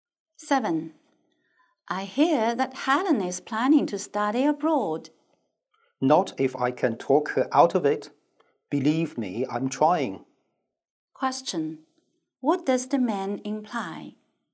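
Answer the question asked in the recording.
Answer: He is trying to persuade Helen not to study abroad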